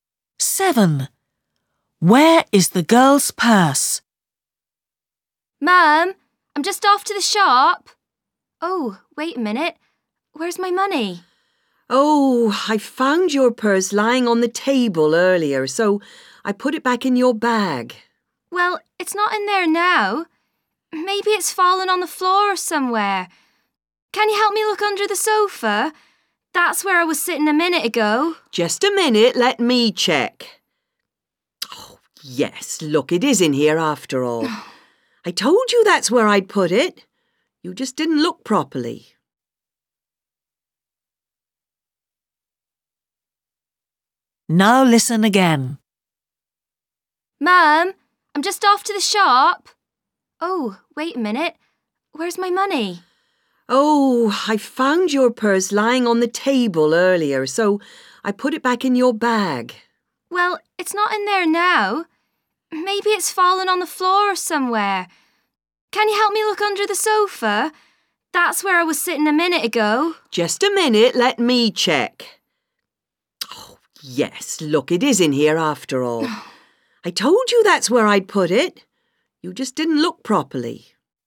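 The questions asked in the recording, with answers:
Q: Where is the girl's purse?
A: In her bag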